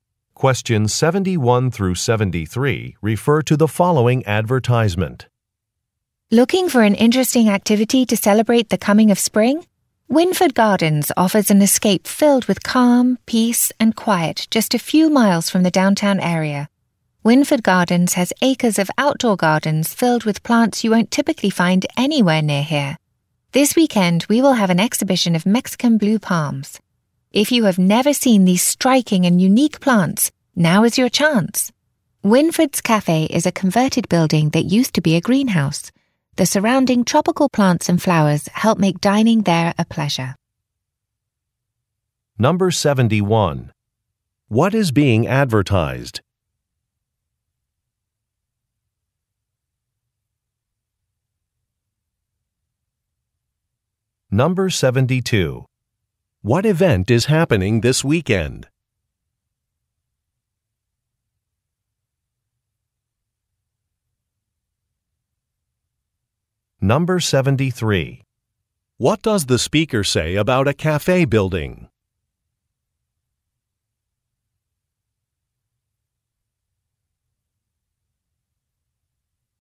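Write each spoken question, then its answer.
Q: What is being advertised?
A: Winford Gardens, a botanical garden

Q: What event is happening this weekend?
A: An exhibition of Mexican blue palms

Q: What does the speaker say about a cafe building?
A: It used to be a greenhouse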